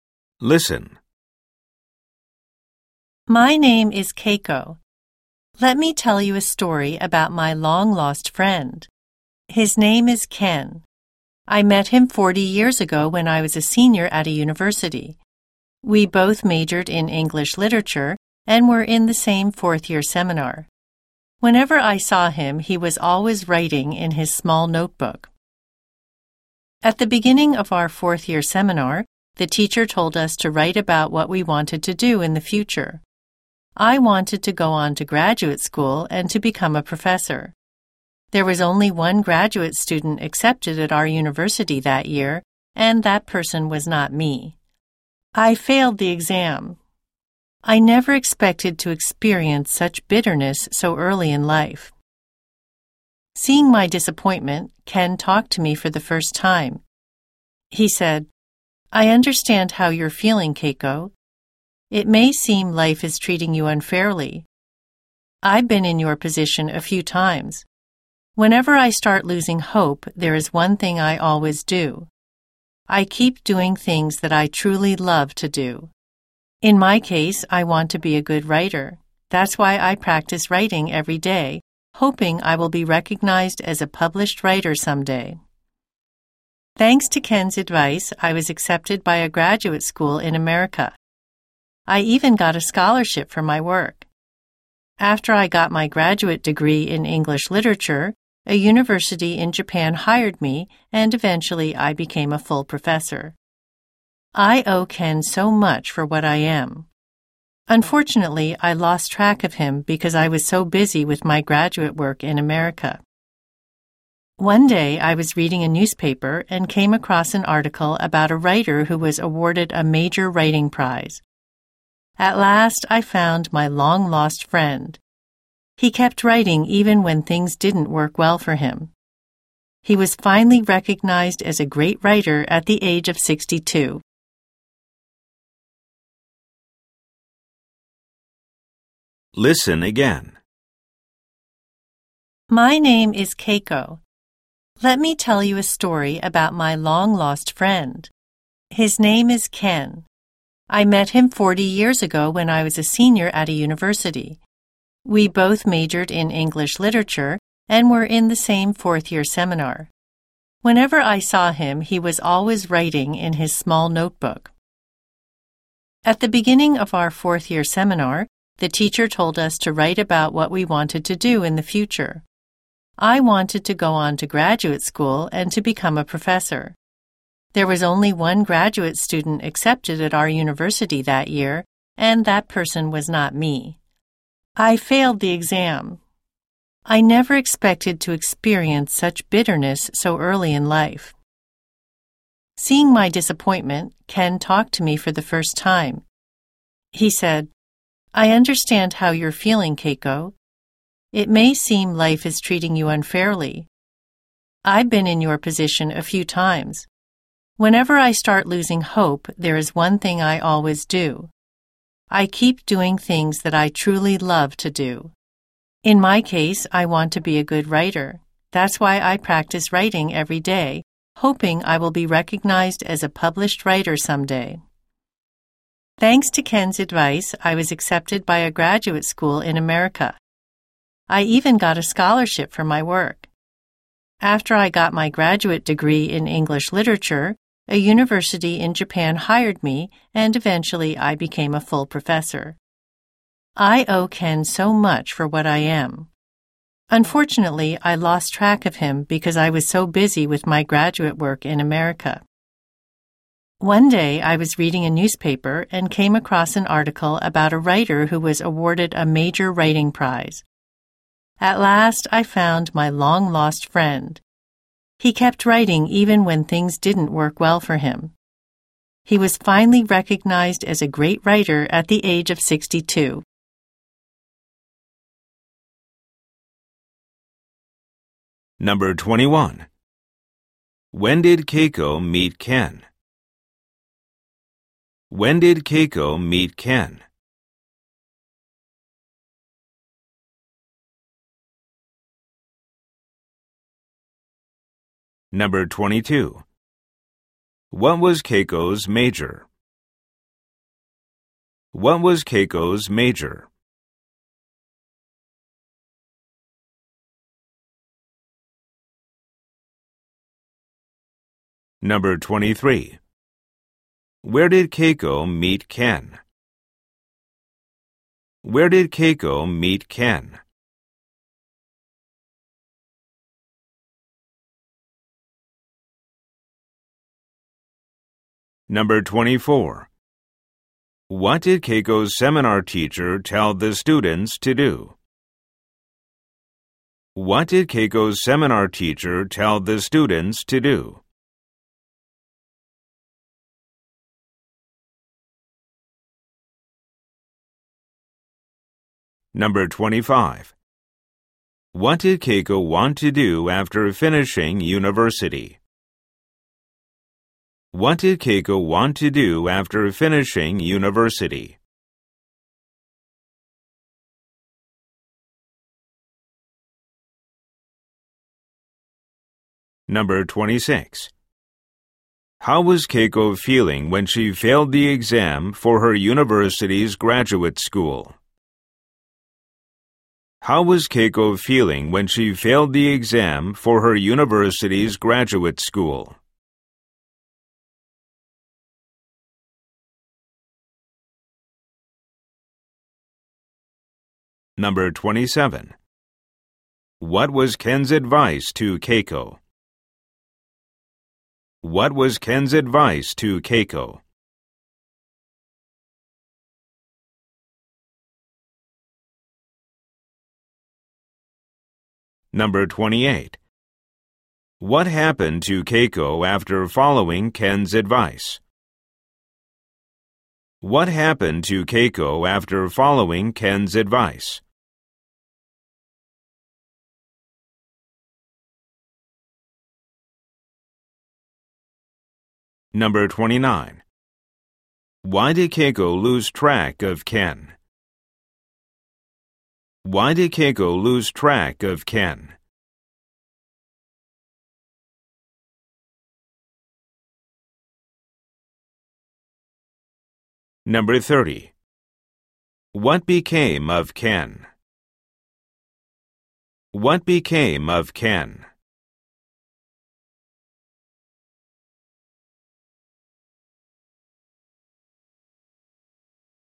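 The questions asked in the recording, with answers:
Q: When did Keiko meet Ken?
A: 40 years ago, when she was a senior at university

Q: What was Keiko's major?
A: English literature

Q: Where did Keiko meet Ken?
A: At university, in their fourth-year seminar

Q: What did Keiko's seminar teacher tell the students to do?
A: Write about what they wanted to do in the future

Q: What did Keiko want to do after finishing university?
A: Go on to graduate school and become a professor

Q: How was Keiko feeling when she failed the exam for her university's graduate school?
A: Disappointed and bitter

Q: What was Ken's advice to Keiko?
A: Keep doing things she truly loves to do

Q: What happened to Keiko after following Ken's advice?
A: She was accepted by a graduate school in America and got a scholarship

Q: Why did Keiko lose track of Ken?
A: She was very busy with her graduate work in America

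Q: What became of Ken?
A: He became a great writer and won a major writing prize at 62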